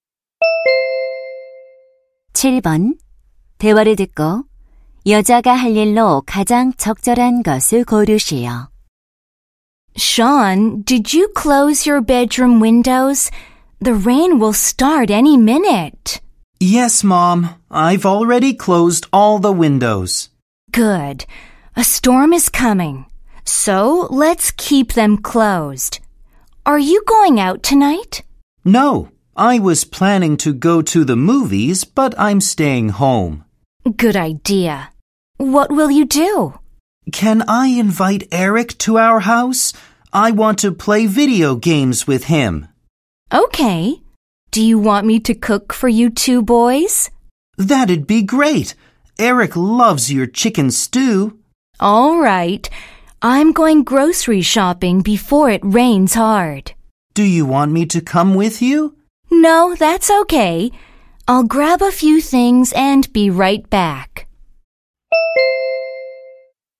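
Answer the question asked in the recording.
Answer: 장보러 가기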